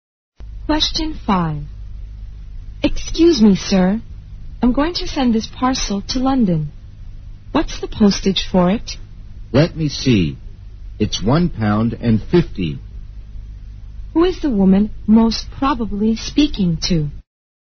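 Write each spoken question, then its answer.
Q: Who is the woman most probably speaking to?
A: A post office clerk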